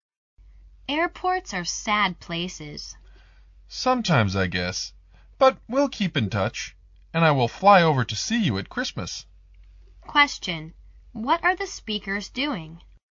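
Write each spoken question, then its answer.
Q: What are the speakers doing?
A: Saying goodbye at an airport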